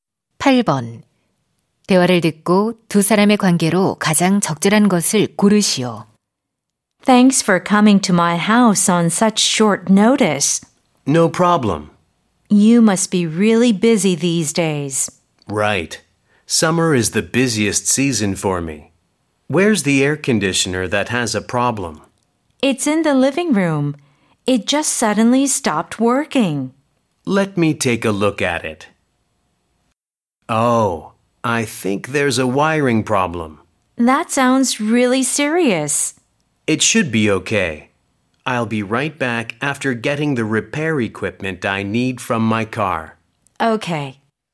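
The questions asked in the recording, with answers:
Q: 대화를 듣고 두 사람의 관계로 가장 적절한 것을 고르시오.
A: 고객 - 에어컨 수리 기사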